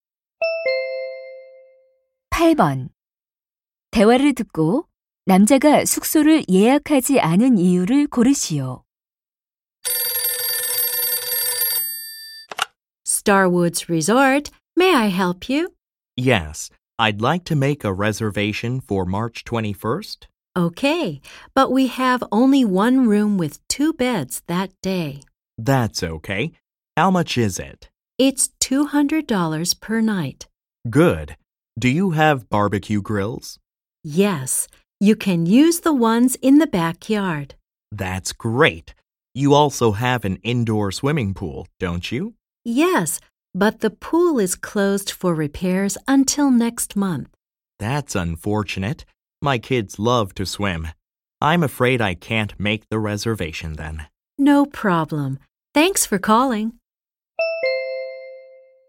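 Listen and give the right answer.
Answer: 실내 수영장이 수리 중이어서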